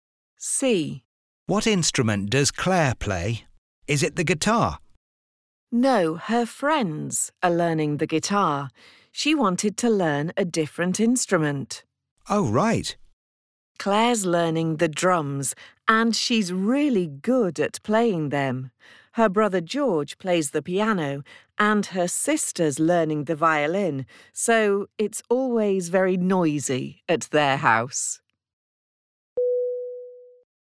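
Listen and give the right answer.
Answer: The drums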